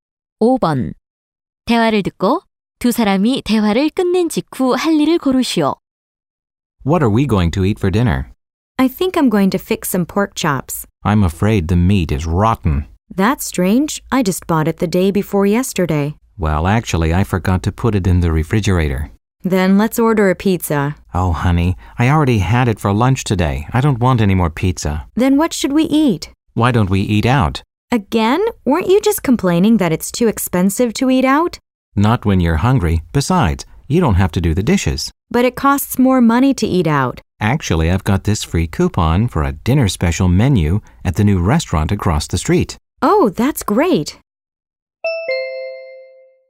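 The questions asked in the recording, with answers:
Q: 대화를 듣고 두 사람이 대화를 끝낸 직후 할 일을 고르시오.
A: 새 식당에 외식하러 가기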